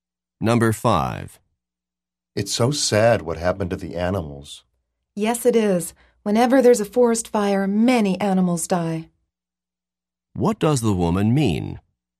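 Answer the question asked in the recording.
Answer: Many animals die whenever there's a forest fire.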